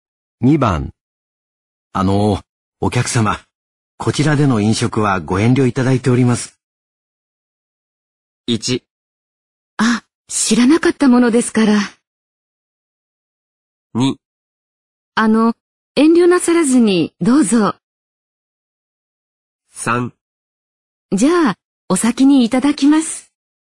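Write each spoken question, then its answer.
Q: お客様、こちらでの飲食はご遠慮いただいております。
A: 1: あ、知らなかったものですから。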